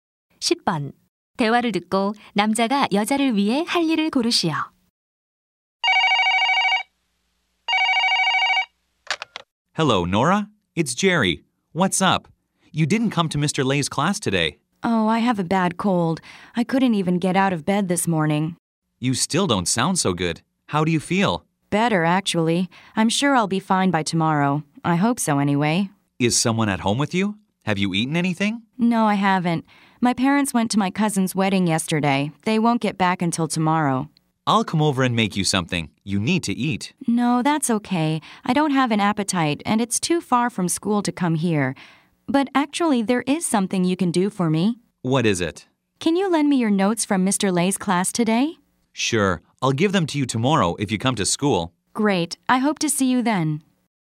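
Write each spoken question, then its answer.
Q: 대화를 듣고 남자가 여자를 위해 할 일을 고르시오.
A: 수업 노트 빌려주기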